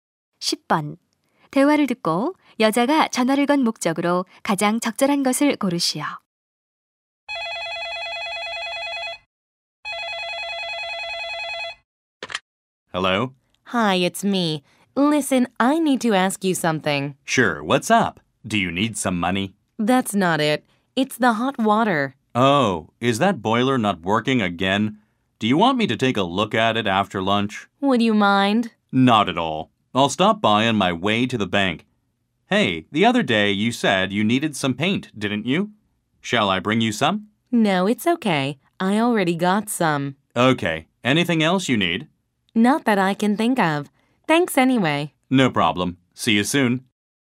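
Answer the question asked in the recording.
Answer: 고장 난 보일러(온수) 수리 부탁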